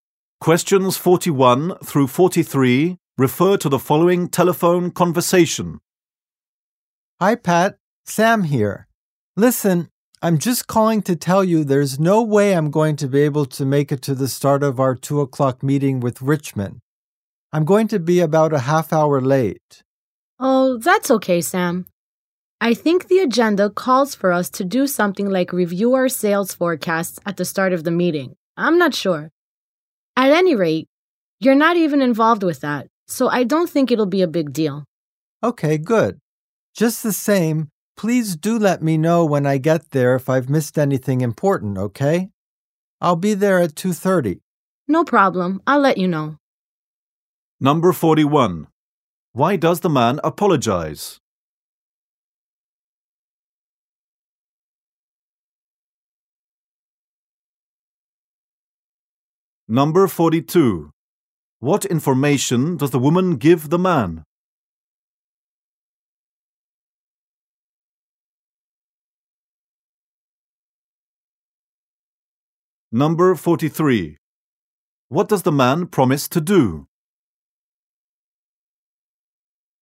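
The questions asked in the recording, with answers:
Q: Why does the man apologize?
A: He will be about half an hour late for the 2 o'clock meeting

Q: What information does the woman give the man?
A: The meeting starts with a review of sales forecasts, which he isn't involved in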